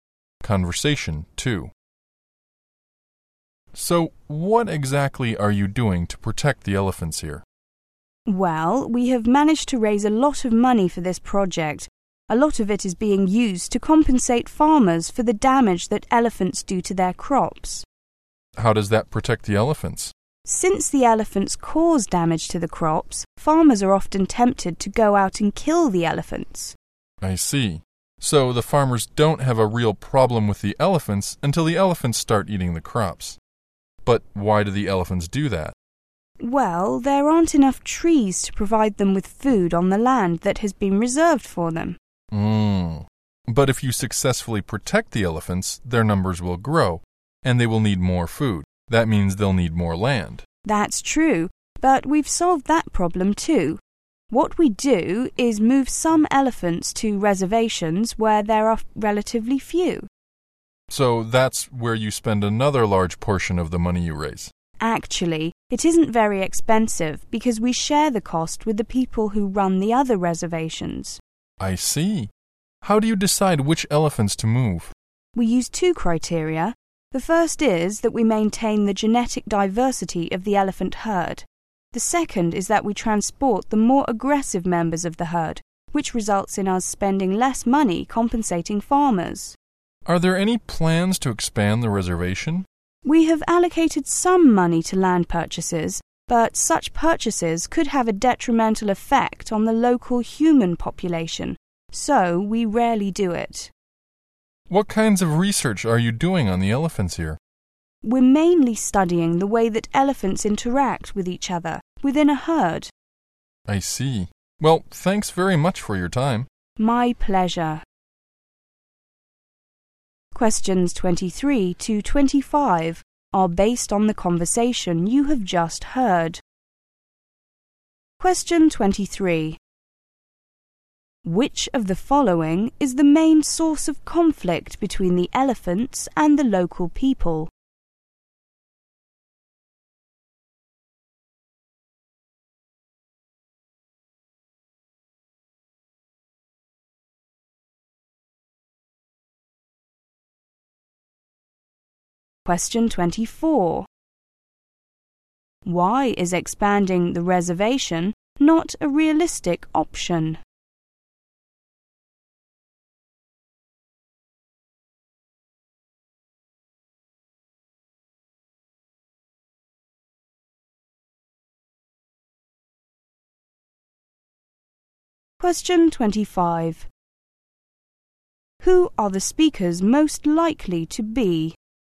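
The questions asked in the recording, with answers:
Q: Which of the following is the main source of conflict between the elephants and the local people?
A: Elephants eat and damage the farmers' crops

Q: Why is expanding the reservation not a realistic option?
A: Buying land could harm the local human population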